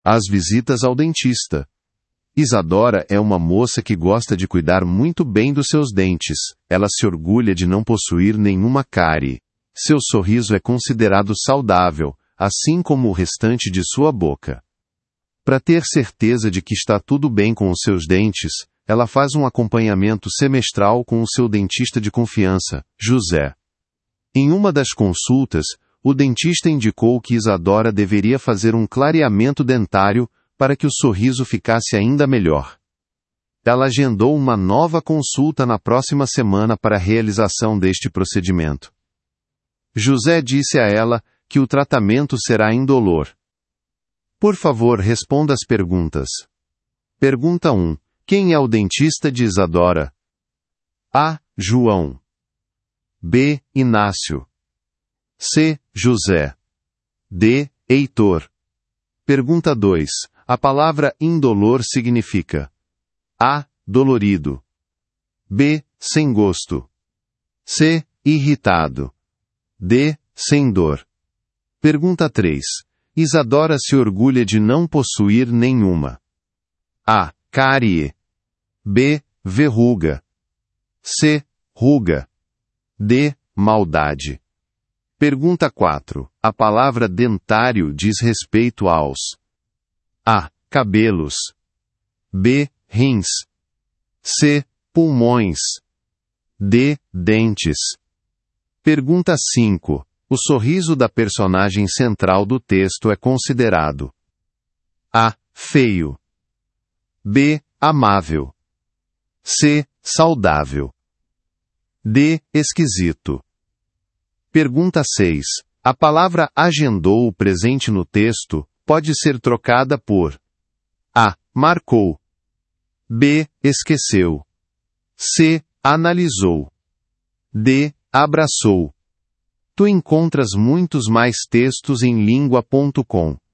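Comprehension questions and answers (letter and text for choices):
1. Quem é o dentista de Isadora?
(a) João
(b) Inácio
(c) José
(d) Heitor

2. A palavra "indolor" significa:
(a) Dolorido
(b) Sem gosto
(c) Irritado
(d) Sem dor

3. Isadora se orgulha de não possuir nenhuma:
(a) Cárie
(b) Verruga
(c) Ruga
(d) Maldade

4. A palavra "dentário" diz respeito aos:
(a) Cabelos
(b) Rins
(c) Pulmões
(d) Dentes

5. O sorriso da personagem central do texto é considerado:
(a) Feio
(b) Amável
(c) Saudável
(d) Esquisito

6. A palavra "agendou", presente no texto, pode ser trocada por:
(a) Marcou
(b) Esqueceu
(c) Analisou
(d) Abraçou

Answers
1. (c) José
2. (d) Sem dor
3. (a) Cárie
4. (d) Dentes
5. (c) Saudável
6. (a) Marcou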